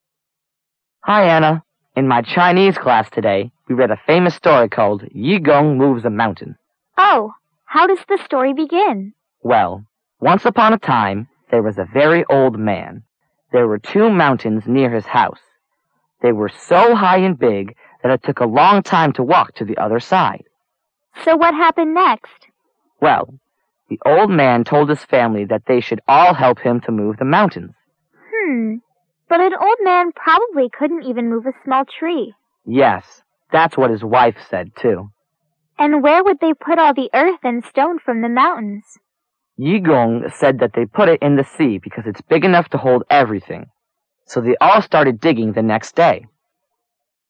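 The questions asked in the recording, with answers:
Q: Which story are Anna and Wang Ming talking about?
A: Yu Gong Moves a Mountain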